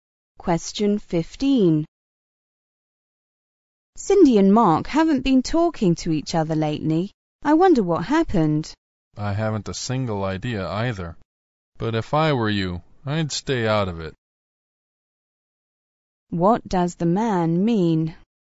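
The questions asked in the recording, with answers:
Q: What does the man mean?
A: The woman shouldn't get involved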